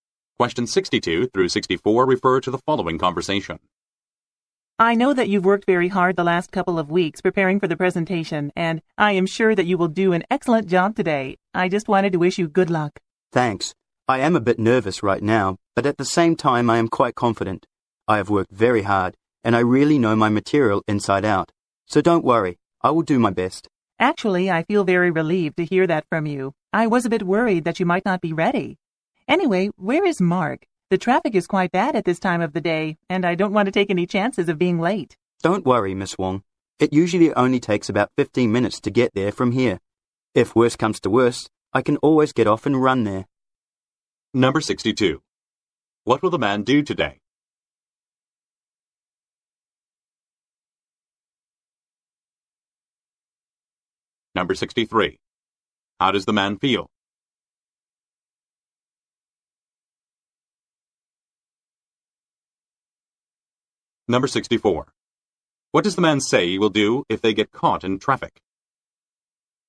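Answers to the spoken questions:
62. Give a presentation
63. A bit nervous but confident
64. Get off and run there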